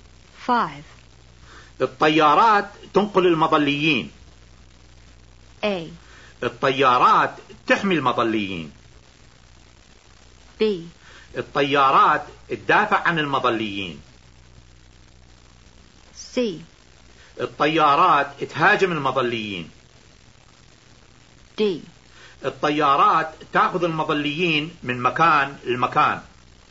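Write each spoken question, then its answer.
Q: الطيارات تنقل المظليين.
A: D: الطيارات تأخذ المظليين من مكان لمكان.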